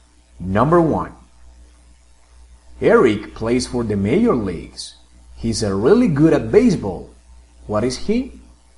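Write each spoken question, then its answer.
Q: What is he?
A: a baseball player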